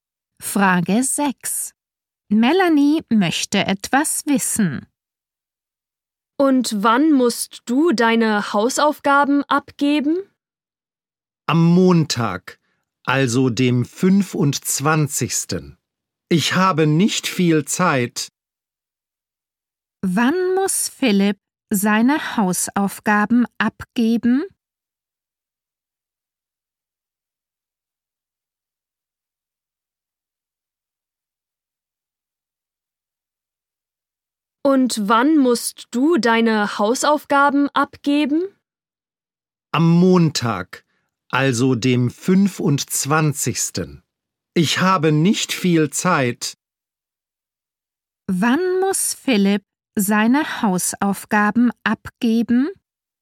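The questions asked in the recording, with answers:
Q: Wann muss Philipp seine Hausaufgaben abgeben?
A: Am Montag, dem 25.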